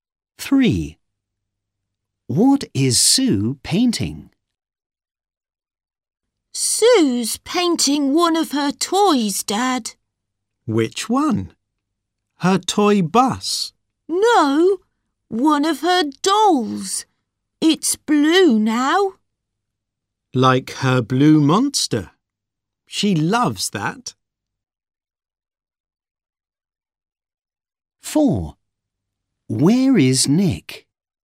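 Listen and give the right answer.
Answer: one of her dolls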